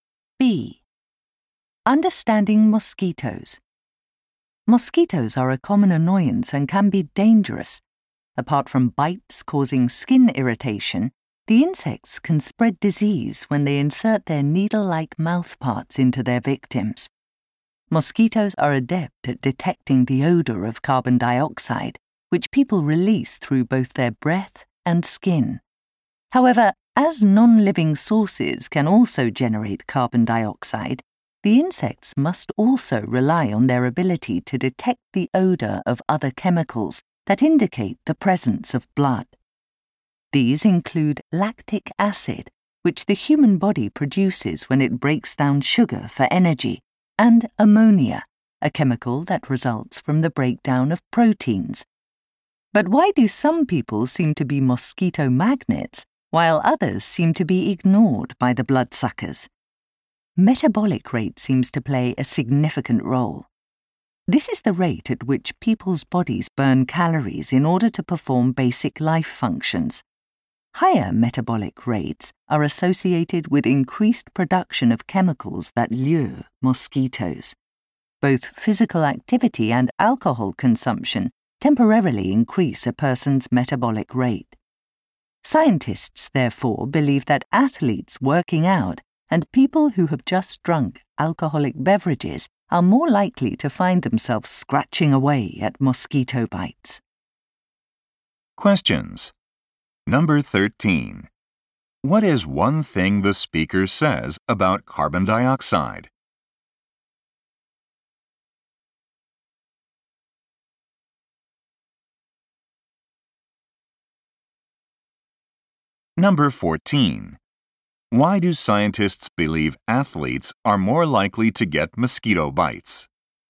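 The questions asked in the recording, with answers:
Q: What is one thing the speaker says about carbon dioxide?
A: It is also produced by non-living sources, so mosquitoes need other odors too

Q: Why do scientists believe athletes are more likely to get mosquito bites?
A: Exercise raises their metabolic rate, producing more chemicals that attract mosquitoes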